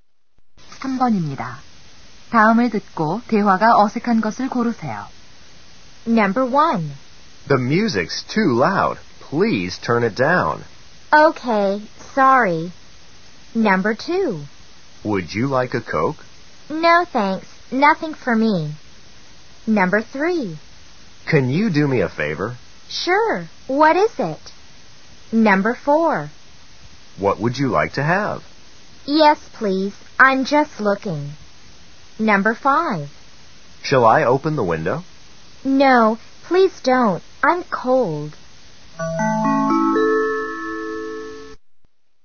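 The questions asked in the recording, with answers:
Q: 다음을 듣고 대화가 어색한 것을 고르세요.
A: 4번: What would you like to have? / Yes, please. I'm just looking.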